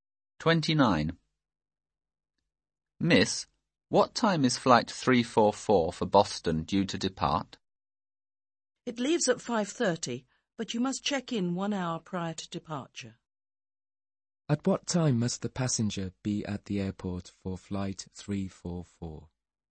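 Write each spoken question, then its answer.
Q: At what time must the passenger be at the airport for flight 344?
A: 4:30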